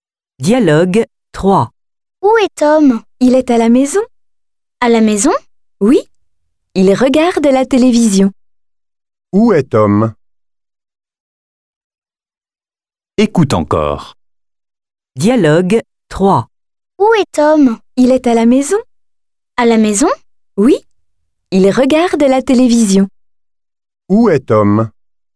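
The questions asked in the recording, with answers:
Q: Où est Tom ?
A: À la maison.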